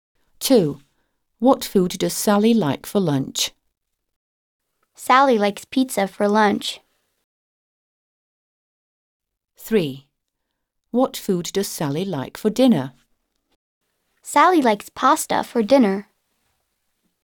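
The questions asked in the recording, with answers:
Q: What food does Sally like for lunch?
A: pizza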